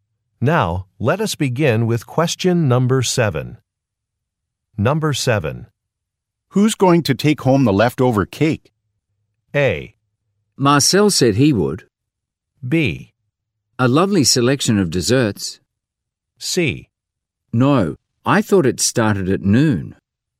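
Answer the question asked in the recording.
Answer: A: Marcel said he would.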